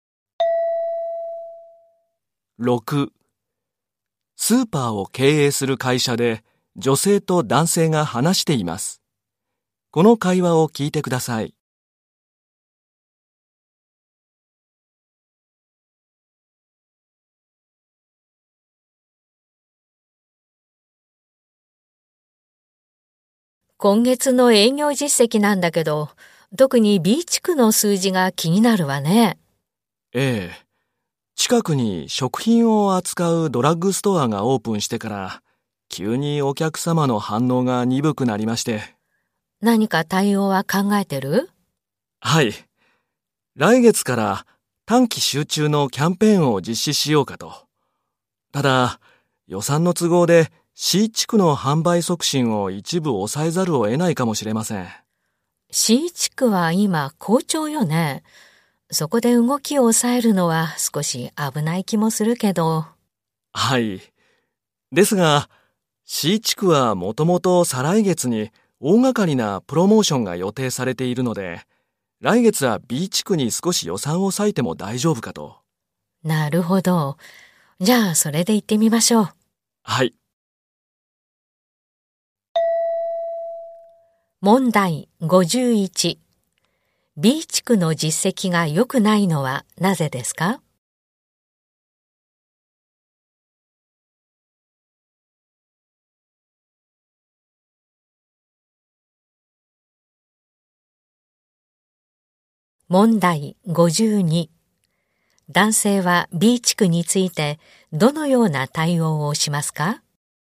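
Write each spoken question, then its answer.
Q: B 地区の実績が良くないのはなぜですか?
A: 近くに食品を扱うドラッグストアがオープンしたから

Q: 男性は B 地区についてどのような対応をしますか?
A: 来月から短期集中のキャンペーンを実施する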